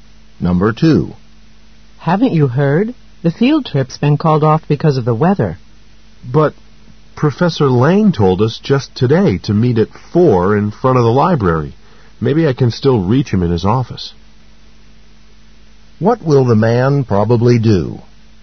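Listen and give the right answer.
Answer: Try to reach Professor Lang in his office.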